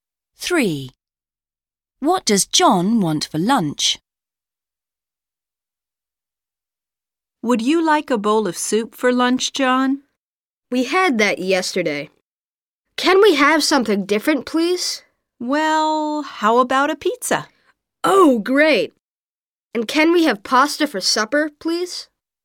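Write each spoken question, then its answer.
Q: What does John want for lunch?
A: A pizza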